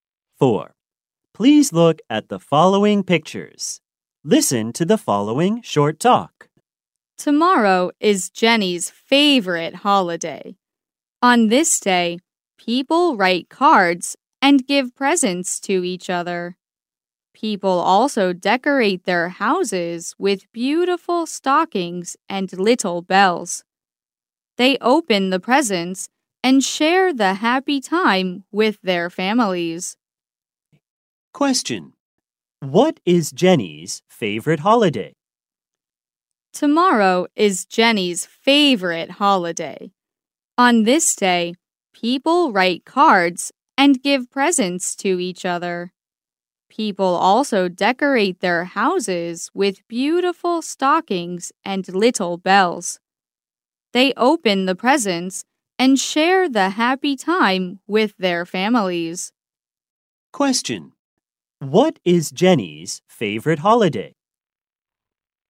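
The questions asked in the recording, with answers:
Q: What is Jenny's favorite holiday?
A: Christmas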